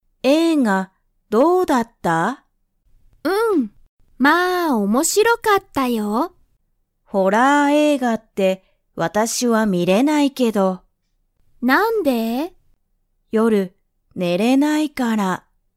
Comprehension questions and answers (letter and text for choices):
Comprehension Quiz (Skip if you don't understand the conversation yet)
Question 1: ____は面白(おもしろ)かった。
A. 友達(ともだち)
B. 学校(がっこう)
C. 仕事(しごと)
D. 映画(えいが)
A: D. 映画(えいが)